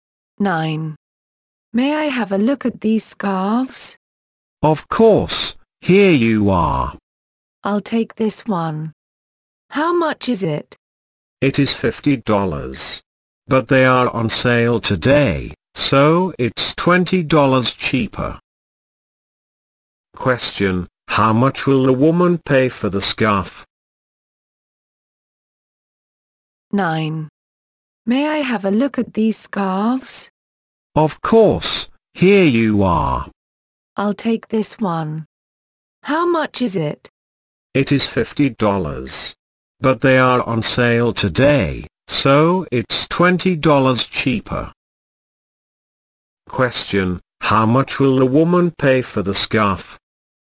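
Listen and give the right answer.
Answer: $30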